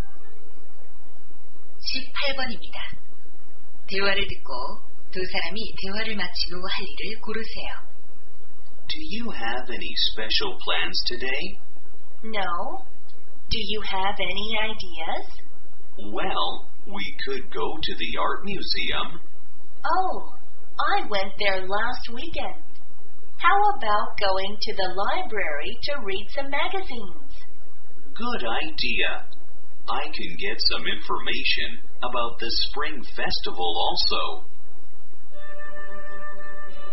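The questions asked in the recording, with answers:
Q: 대화를 듣고 두 사람이 대화를 마치고 할 일을 고르세요.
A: 도서관에 가서 잡지 읽기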